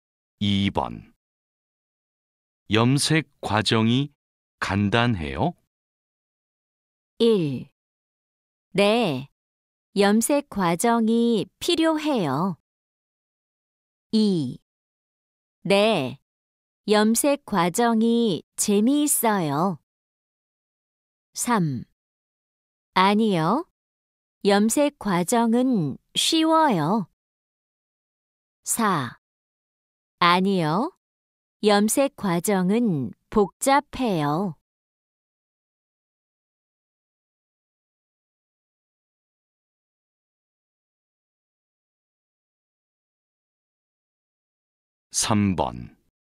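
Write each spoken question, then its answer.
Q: 염색 과정이 간단해요?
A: 4: 아니요, 염색 과정은 복잡해요.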